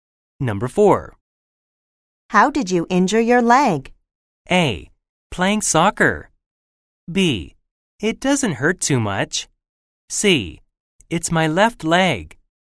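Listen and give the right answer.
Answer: A: Playing soccer.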